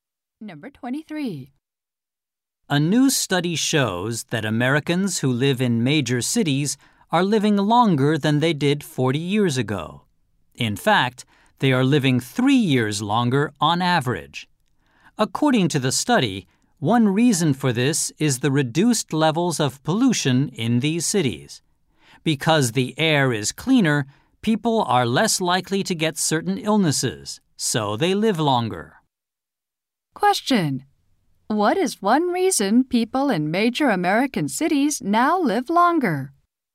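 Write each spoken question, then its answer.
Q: What is one reason people in major American cities now live longer?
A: Reduced pollution levels, so cleaner air.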